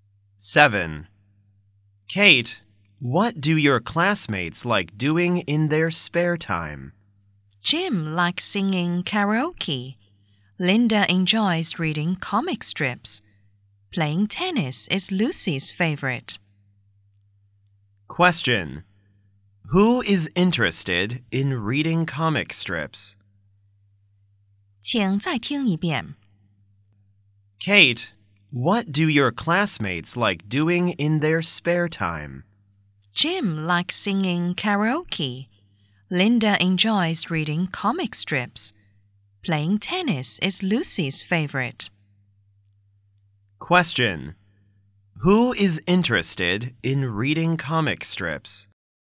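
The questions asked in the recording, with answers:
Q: Who is interested in reading comic strips?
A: Linda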